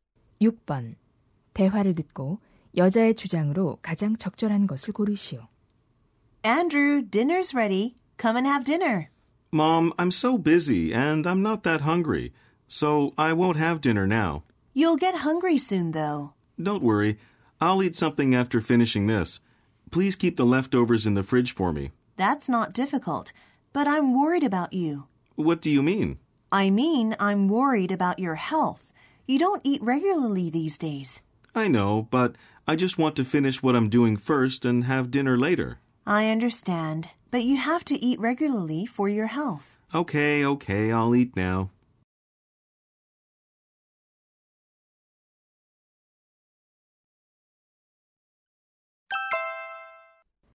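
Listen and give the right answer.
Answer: 건강을 위해 식사를 규칙적으로 해야 한다.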